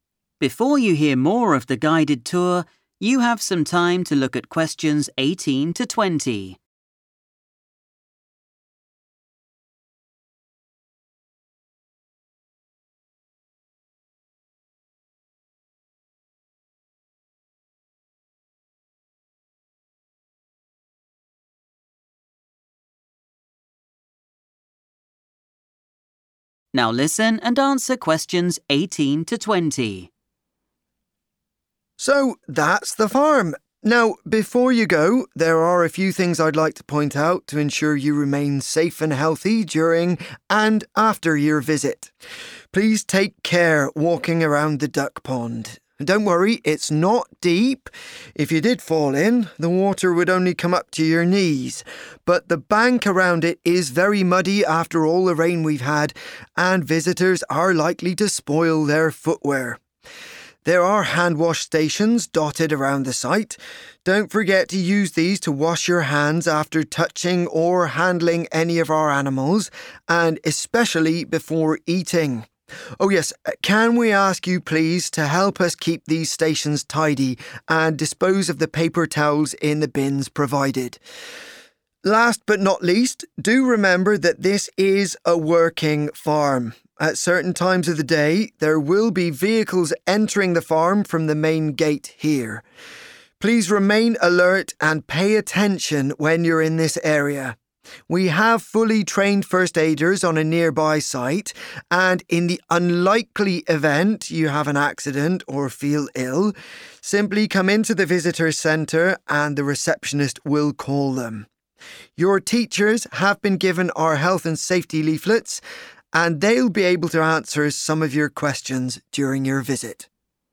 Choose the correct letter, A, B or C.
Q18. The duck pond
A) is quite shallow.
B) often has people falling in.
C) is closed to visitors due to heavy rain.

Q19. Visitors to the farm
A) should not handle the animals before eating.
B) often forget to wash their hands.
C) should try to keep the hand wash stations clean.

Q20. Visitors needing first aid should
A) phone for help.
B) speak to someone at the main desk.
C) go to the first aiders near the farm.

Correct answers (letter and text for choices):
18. A) is quite shallow.
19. C) should try to keep the hand wash stations clean.
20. B) speak to someone at the main desk.

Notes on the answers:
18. The correct answer is A because the speaker explicitly states that the duck pond is "not deep." To help the visitors visualize this, the speaker mentions that even if someone fell in, the water would only reach their knees. In English, "shallow" is a common synonym for water that is not deep.
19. The correct answer is C because the speaker specifically asks the visitors to help keep the 'hand wash stations' tidy. To keep something 'tidy' means to keep it clean and organized. The speaker suggests that visitors should put their used paper towels in the bins to help with this. While the speaker tells people to wash their hands before eating, they do not say 'do not touch animals before eating' (Choice A), and they do not say that people usually forget to wash their hands (Choice B).
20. The correct answer is B because the speaker tells visitors to go to the Visitors Centre if they have an accident or feel sick. In that building, the receptionist—the person working at the desk—will call the people who can help. Choice C is wrong because the visitors do not go to the first aiders themselves; Choice A is wrong because the receptionist makes the phone call for the visitor.

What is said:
You might have to queue for a while to get in. But if this is the case, pop over the bridge and pay the insect house a visit – it's immediately on your left. For some strange reason, this doesn't tend to be quite as popular as the rabbits. And just over here, closer to us, on the right side of the entrance, you'll find our gift shop if you want to buy something to remember your visit or a gift for someone special.
So, that's the farm. Now before you go, there are a few things I'd like to point out to ensure you remain safe and healthy during and after your visit. Please take care walking around the duck pond. Don't worry, it's not deep. If you did fall in, the water would only come up to your knees. But the bank around it is very muddy after all the rain we've had and visitors are likely to spoil their footwear. There are hand wash stations dotted around the site. Don't forget to use these to wash your hands after touching or handling any of our animals, and especially before eating. Oh yes, can we ask you please to help us keep these stations tidy and dispose of the paper towels in the bins provided? Last but not least, do remember that this is a working farm. At certain times of the day, there will be vehicles entering the farm from the main gate here. Please remain alert and pay attention when you're in this area. We have fully trained first aiders on a nearby site, and in the unlikely event you have an accident or feel ill, simply come into the Visitors Centre and the receptionist will call them. Your teachers have been given our health and safety leaflets and they'll be able to answer some of your questions during your visit.